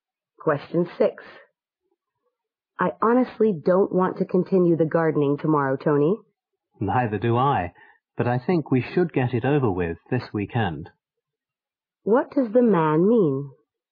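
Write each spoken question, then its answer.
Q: What does the man mean?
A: They should finish the gardening this weekend.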